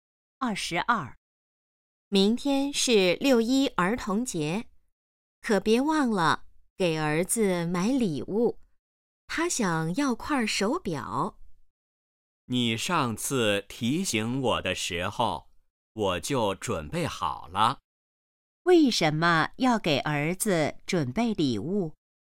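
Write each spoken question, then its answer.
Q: 为什么要给儿子准备礼物?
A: 明天是儿童节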